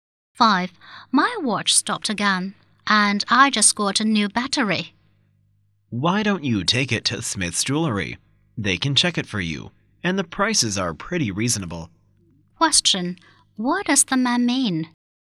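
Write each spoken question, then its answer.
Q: What does the man mean?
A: The woman should take her watch to Smith's Jewelry to have it checked.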